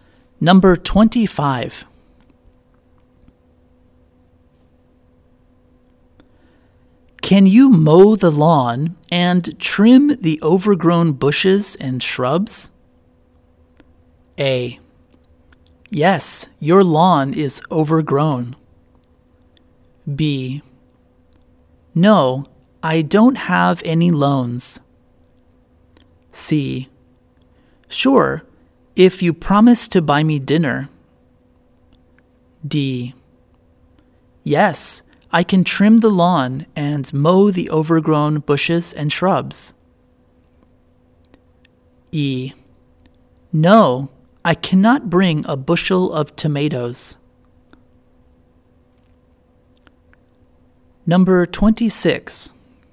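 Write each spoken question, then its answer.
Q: Can you mow the lawn and trim the overgrown bushes and shrubs?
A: C: Sure, if you promise to buy me dinner.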